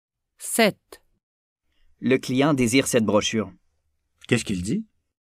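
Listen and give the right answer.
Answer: Il dit que le client désire cette brochure.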